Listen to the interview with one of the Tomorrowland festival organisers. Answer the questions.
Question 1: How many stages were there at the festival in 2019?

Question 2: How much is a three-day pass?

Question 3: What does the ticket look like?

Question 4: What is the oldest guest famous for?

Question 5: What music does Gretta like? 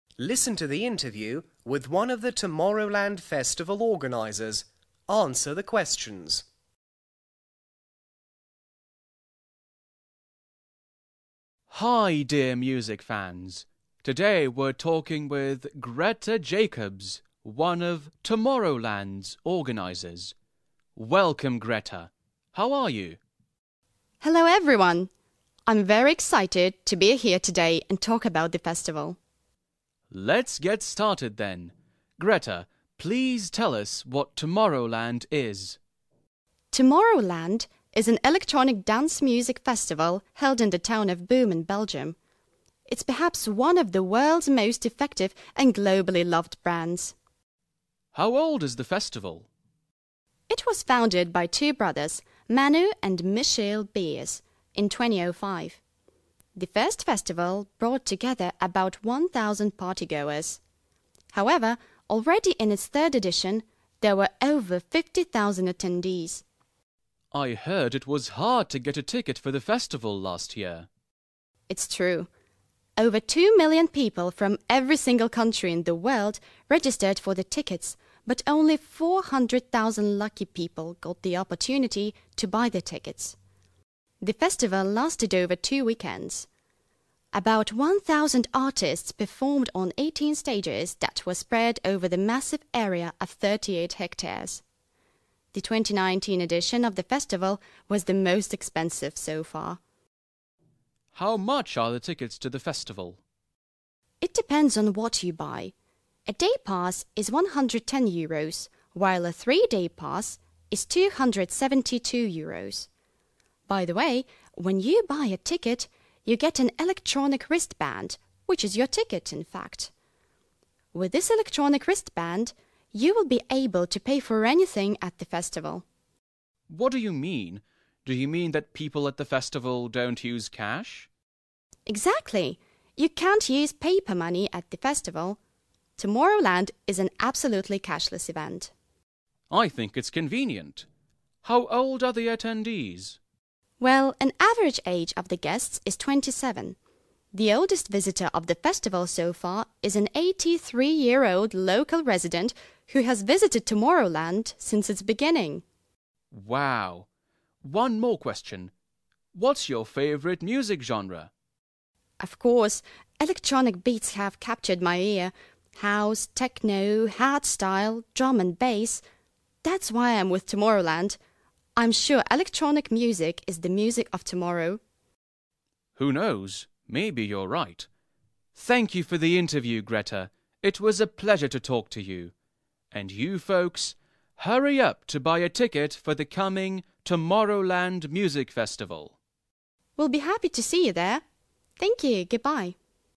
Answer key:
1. 18
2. 272
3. wristband
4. beginning
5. house